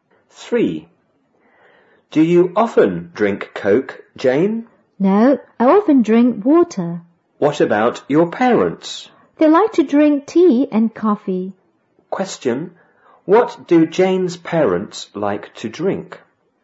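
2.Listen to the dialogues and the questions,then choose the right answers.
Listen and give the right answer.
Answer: Tea and coffee

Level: 五年级下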